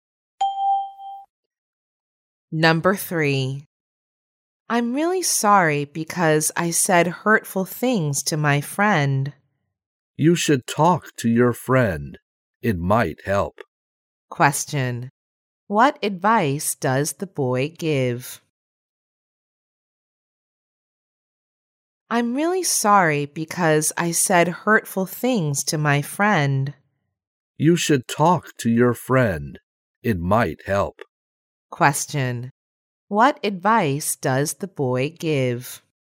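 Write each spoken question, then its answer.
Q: What advice does the boy give?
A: Talk to your friend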